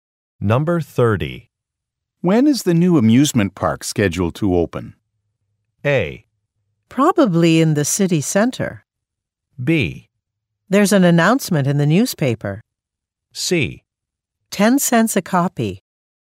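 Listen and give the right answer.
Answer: B: There's an announcement in the newspaper.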